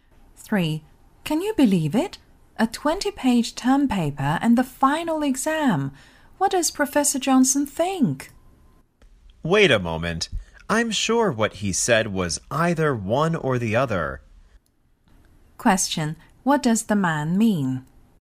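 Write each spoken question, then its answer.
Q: What does the man mean?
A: Students only have to do one of the two, the term paper or the final exam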